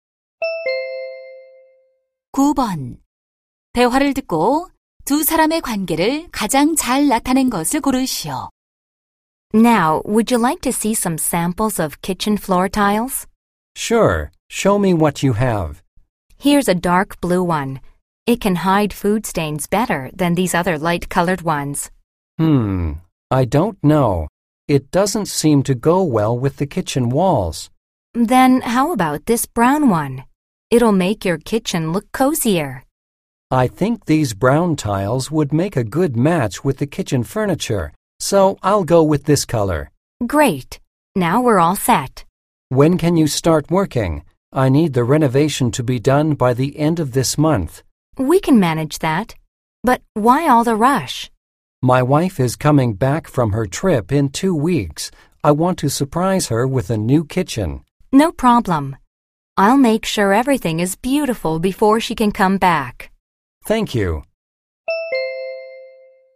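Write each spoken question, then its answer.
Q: 대화를 듣고 두 사람의 관계를 가장 잘 나타낸 것을 고르시오.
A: 고객 - 주방 인테리어 시공업자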